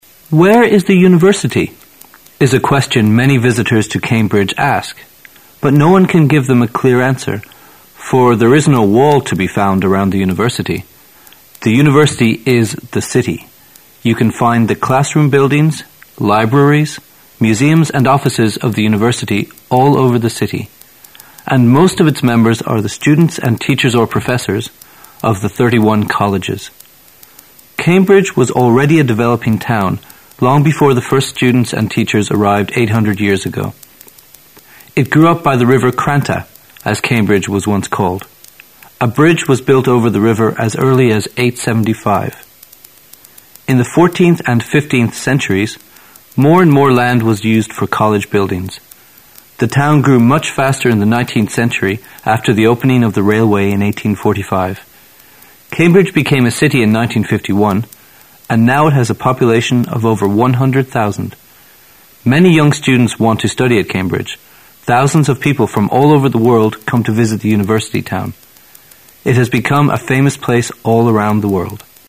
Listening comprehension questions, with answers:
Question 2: Around what time did the university begin to appear?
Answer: Around the 13th century.

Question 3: After which year did the town really begin to develop?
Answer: After 1845.

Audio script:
[解析] 18-20 "Where is the university?" is a question many visitors to Cambridge ask, but no one can give them a clear answer for there is no wall to be found around the university. The university is the city. You can find the classroom buildings, libraries, museums and offices of the university ail over the city. And most of its members are the students and teachers or professors of the 31 colleges. Cambridge was already a developing town long before the first students and teachers arrived 800 years ago. It grew up by the river Cranta, as Cambridge was once called. A bridge was built over the river as early as 875. In the fourteenth and fifteenth centuries more and more land was used for college buildings. The town grew much faster in the nineteenth century after the opening of the railway in 1845. Cambridge became a city in 1951 and now it has a population of over 100,000. Many young students want to study at Cambridge. Thousands of people from all over the world come to visit the university town. It has become a famous place all around the world.